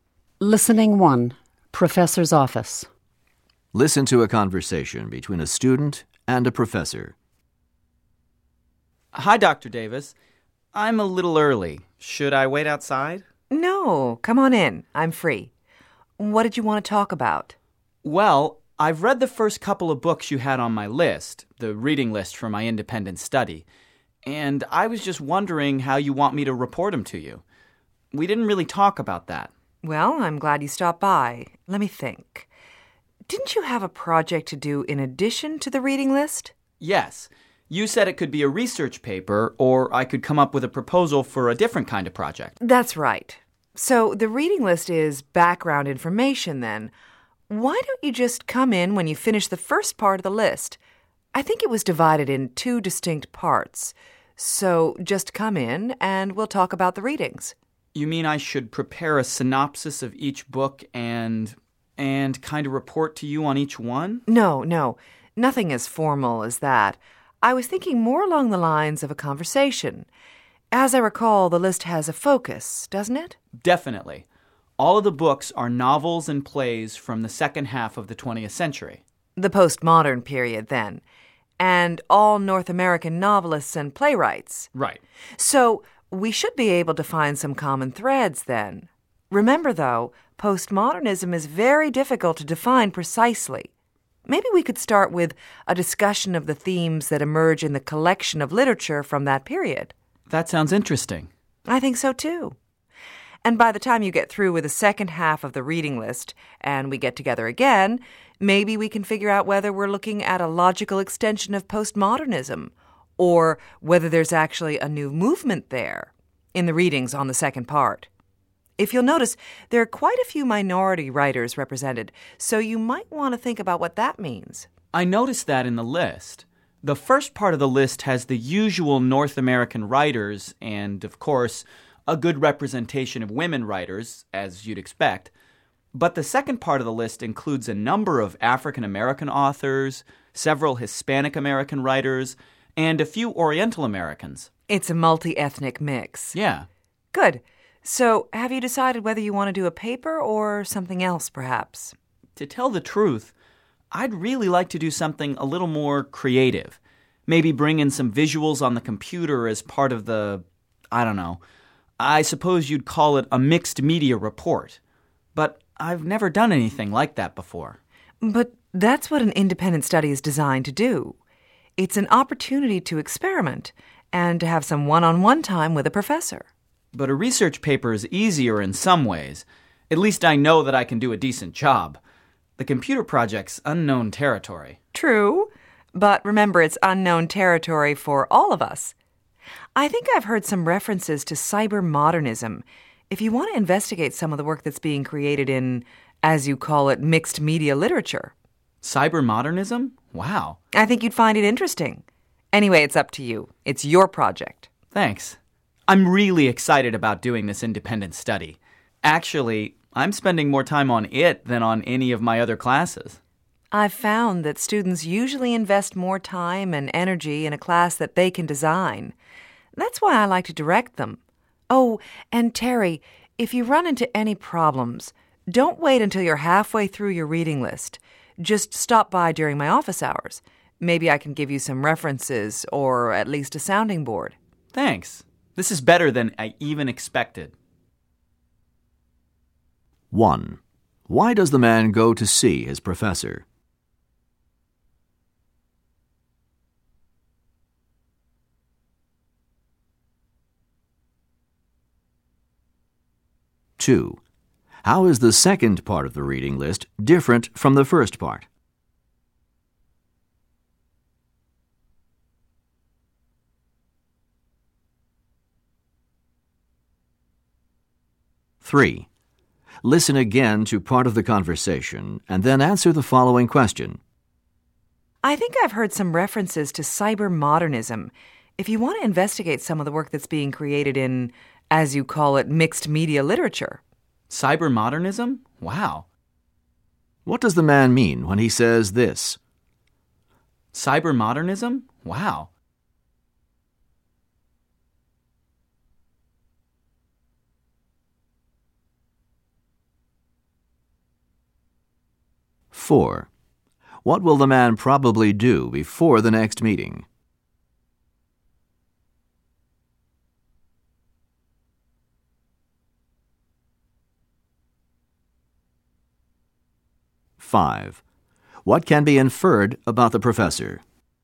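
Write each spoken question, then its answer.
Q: Why does the man go to see his professor?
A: To ask how he should report on the books from his independent study reading list

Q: How is the second part of the reading list different from the first part?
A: It includes more minority writers, a multi-ethnic mix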